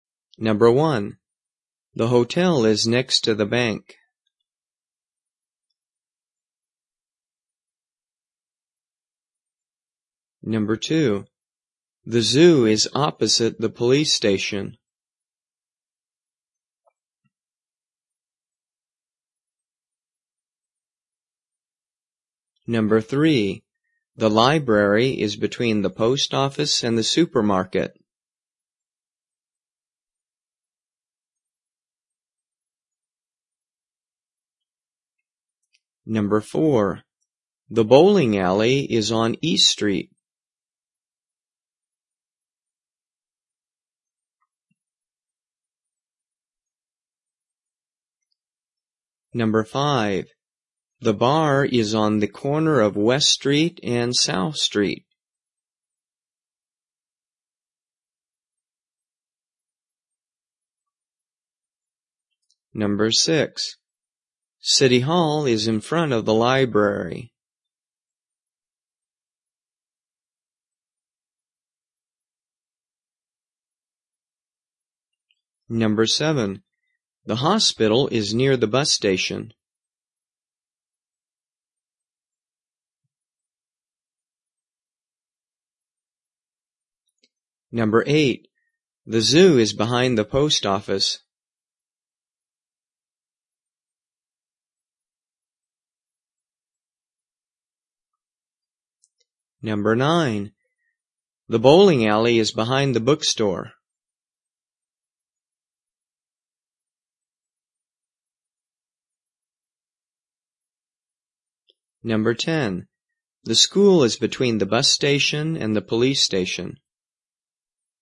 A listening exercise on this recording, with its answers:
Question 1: The hotel is next to the _____________.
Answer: bank

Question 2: The zoo is ____________ the police station.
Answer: opposite

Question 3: The __________ is between the post office and the supermarket.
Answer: library

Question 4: The bowling alley is on _________ Street.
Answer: East

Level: 初级